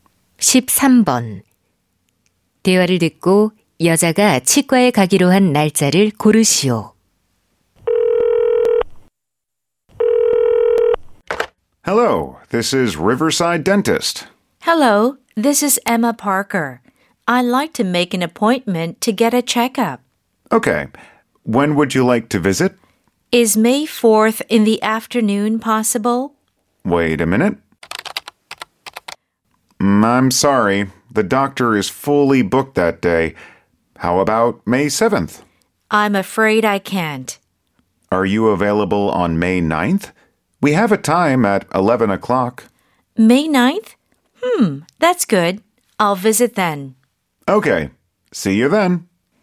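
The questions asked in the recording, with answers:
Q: 대화를 듣고 여자가 치과에 가기로 한 날짜를 고르시오.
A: 5월 9일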